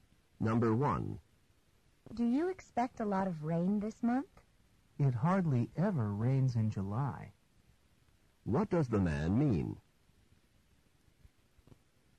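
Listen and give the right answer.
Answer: There's very little rain in July.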